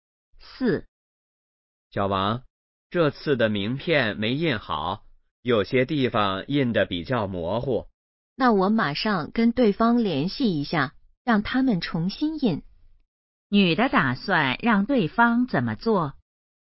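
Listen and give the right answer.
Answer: 重新印名片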